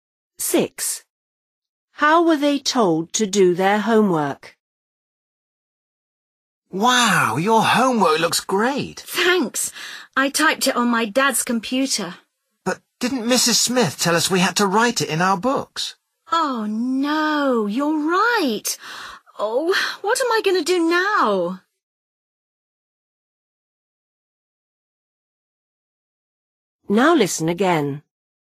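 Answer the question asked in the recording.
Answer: Written in their books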